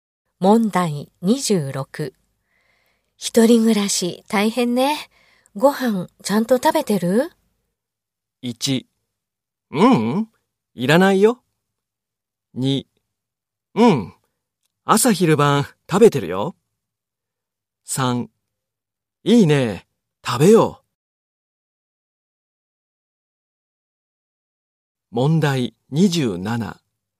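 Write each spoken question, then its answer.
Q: 一人暮らし大変ね。ご飯ちゃんと食べてる?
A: 2: うん、朝昼晩食べてるよ。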